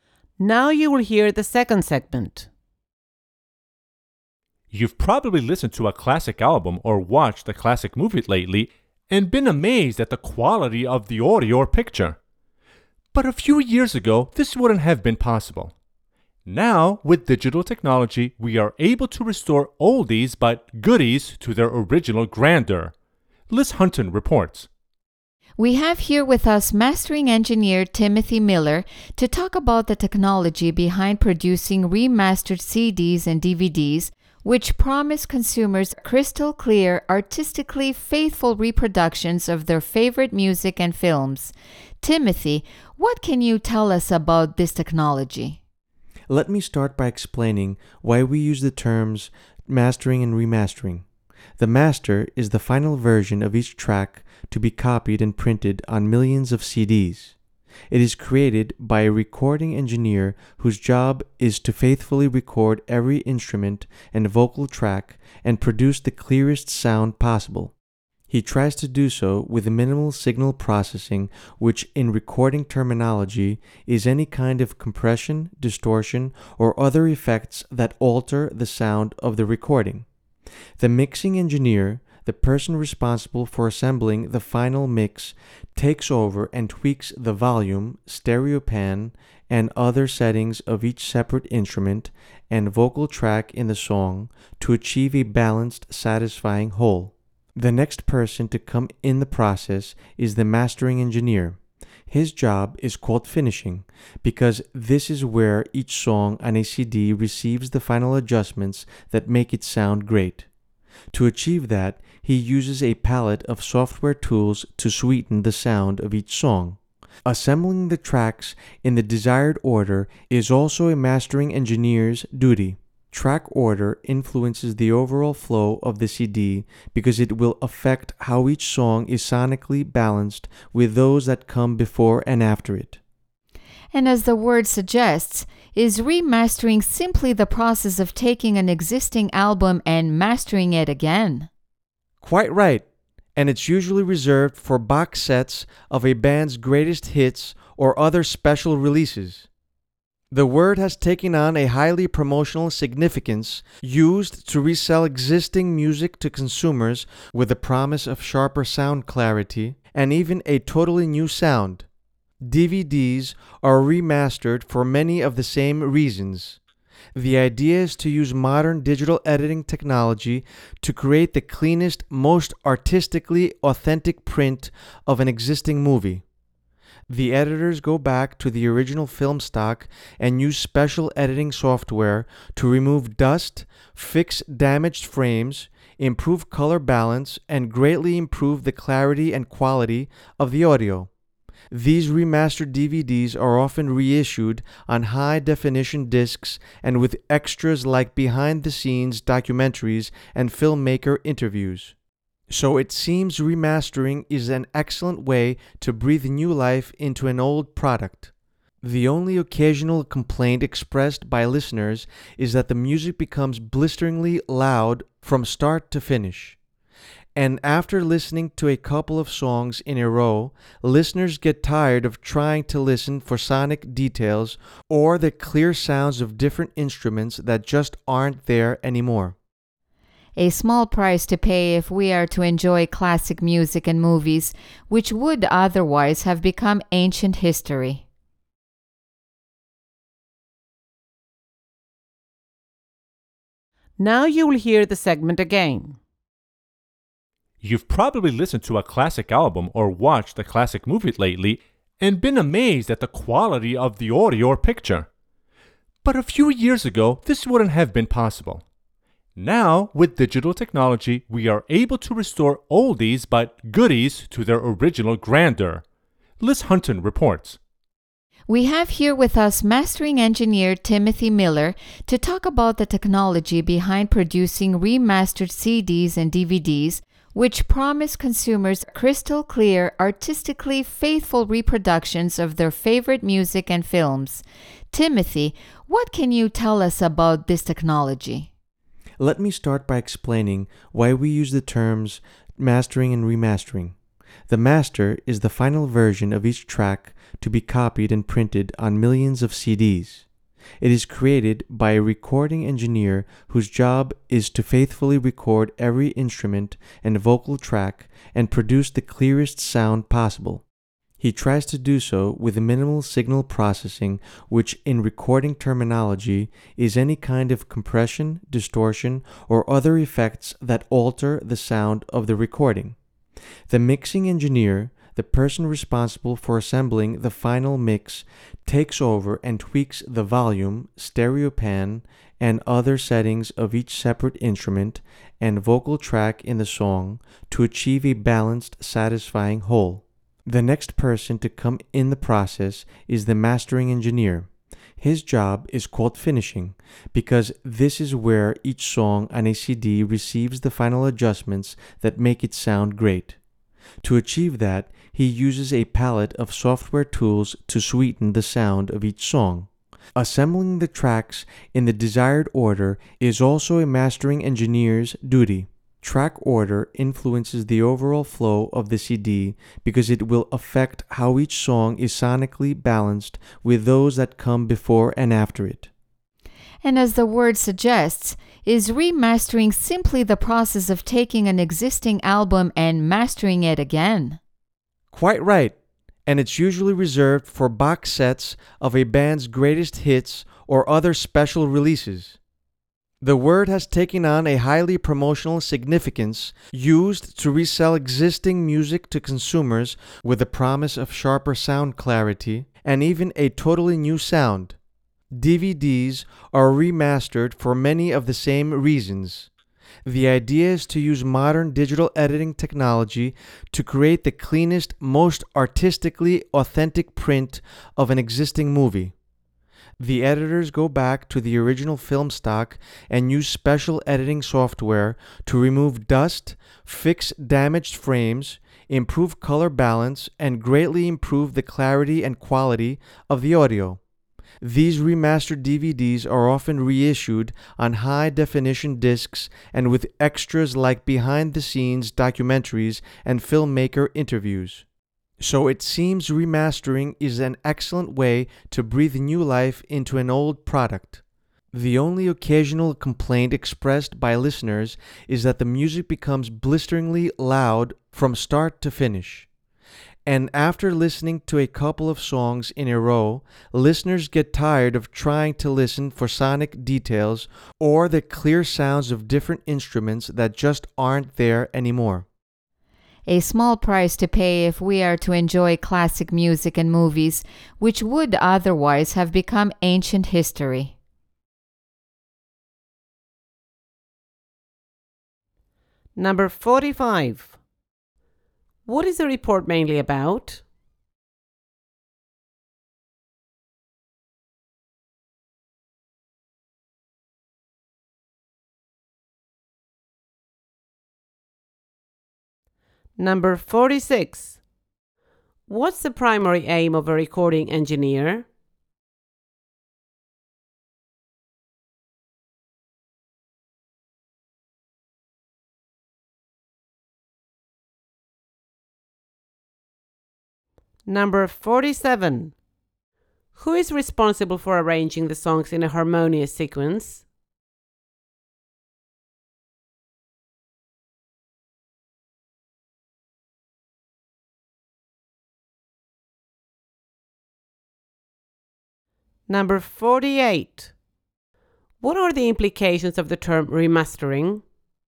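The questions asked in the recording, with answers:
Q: What is the report mainly about?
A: The technology of remastering CDs and DVDs

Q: What's the primary aim of a recording engineer?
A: To record every instrument and vocal track faithfully and produce the clearest sound possible

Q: Who is responsible for arranging the songs in a harmonious sequence?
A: The mastering engineer

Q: What are the implications of the term remastering?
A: It is a promotional word used to resell old music with the promise of sharper sound or a new sound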